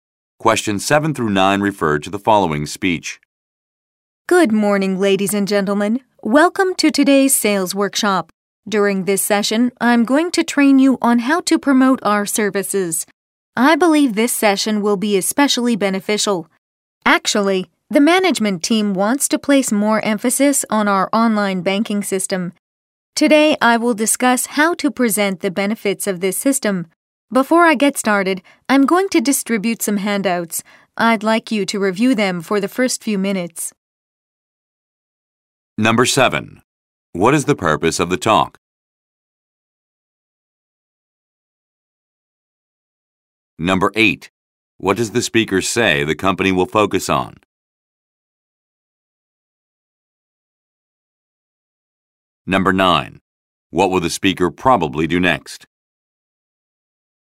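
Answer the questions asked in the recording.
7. To train staff on how to promote the company's services
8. Its online banking system
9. Hand out some handouts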